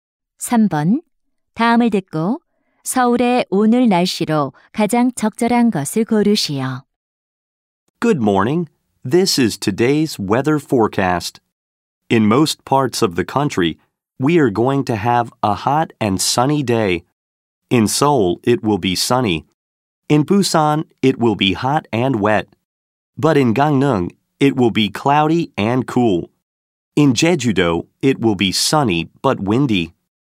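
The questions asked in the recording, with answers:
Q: 다음을 듣고 서울의 오늘 날씨로 가장 적절한 것을 고르시오.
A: 맑음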